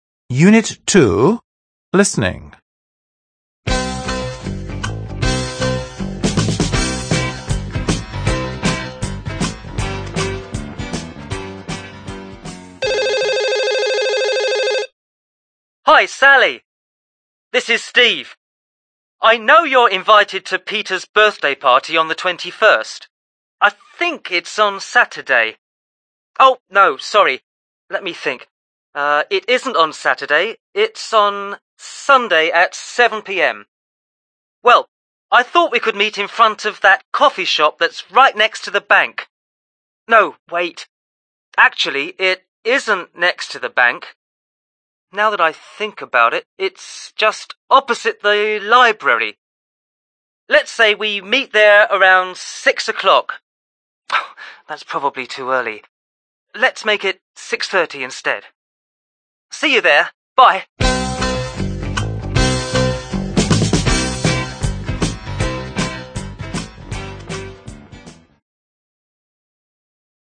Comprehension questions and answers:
3. Listen and complete the missing information. – Послушайте и вставьте пропущенную информацию.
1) Reason:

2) on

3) at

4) Meeting point:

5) opposite the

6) Meeting time:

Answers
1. Peter's birthday party
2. Sunday 21st
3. 7 pm
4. in front of the coffee shop
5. library
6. 6:30

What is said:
Hi, Sally! This is Steve! I know you're invited to Peter's birthday party on the 21st. I think it's on Saturday. Oh no, sorry! Let me think. It isn't on Saturday. It's on Sunday at 7 pm. Well, I thought we could meet in front of that coffee shop that's right next to the bank. No, wait. Actually, it isn't next to the bank. Now that I think about it, it's just opposite the library. Let's say we meet there around 6 o'clock? That's probably too early. Let's make it 6.30 instead. See you there! Bye.

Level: Рабочая тетрадь Spotlight 6 класс